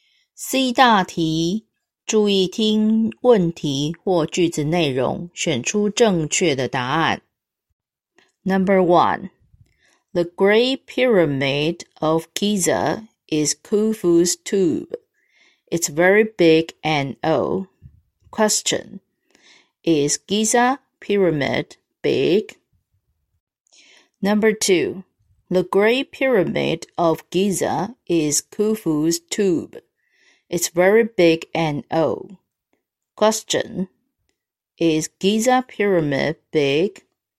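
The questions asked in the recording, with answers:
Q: Is Giza Pyramid big?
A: Yes, it is.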